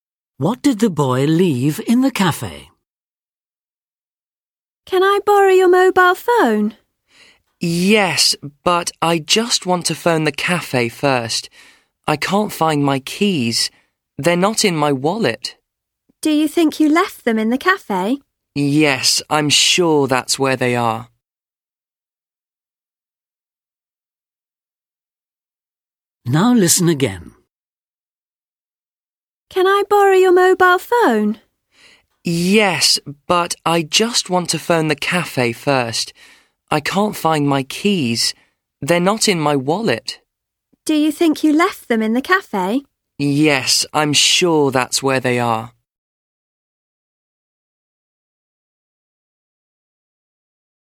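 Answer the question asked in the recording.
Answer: His keys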